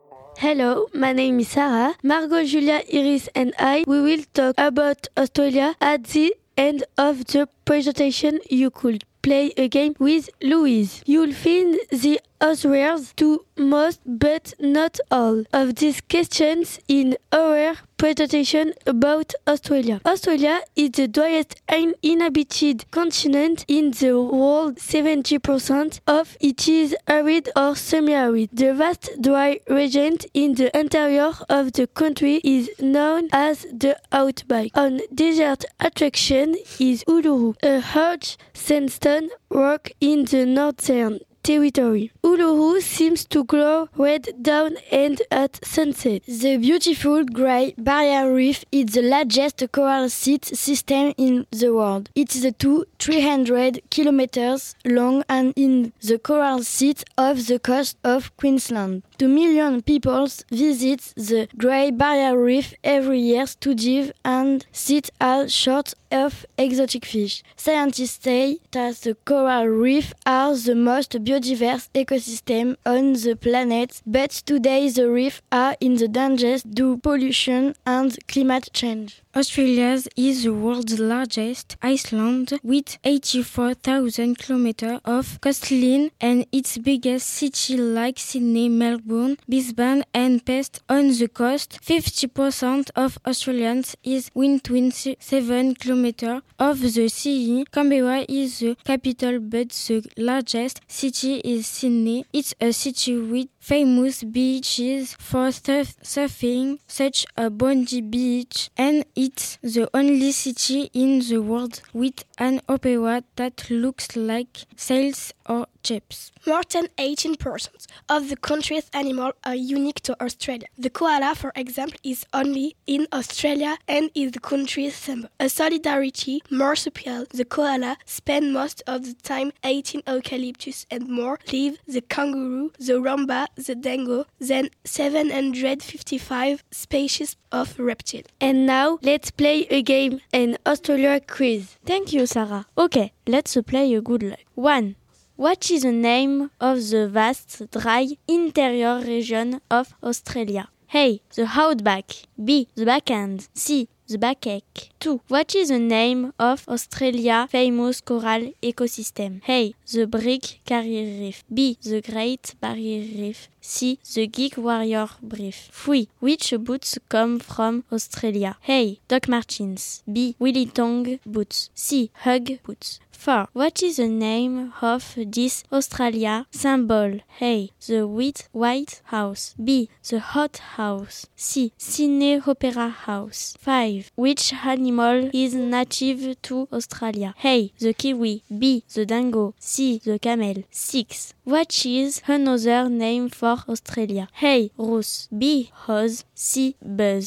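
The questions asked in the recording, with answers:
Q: What is the name of the vast, dry, interior region of Australia?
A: A: The Outback

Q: What is the name of Australia's famous coral ecosystem?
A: B: The Great Barrier Reef

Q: Which animal is native to Australia?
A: B: The dingo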